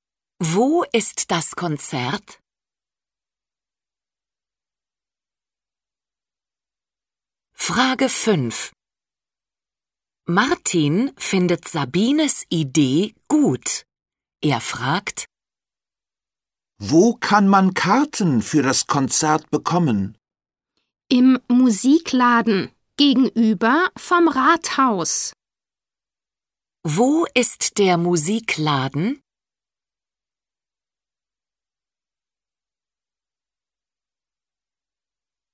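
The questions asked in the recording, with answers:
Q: Wo ist der Musikladen?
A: gegenüber vom Rathaus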